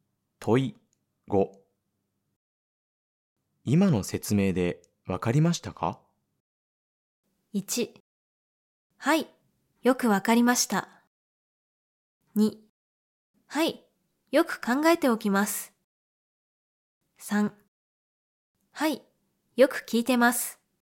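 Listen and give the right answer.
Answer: 1: はい、よくわかりました。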